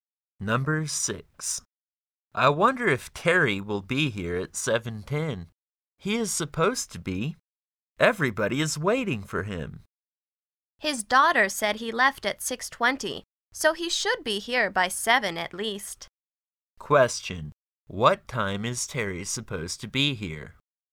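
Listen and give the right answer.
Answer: 7:10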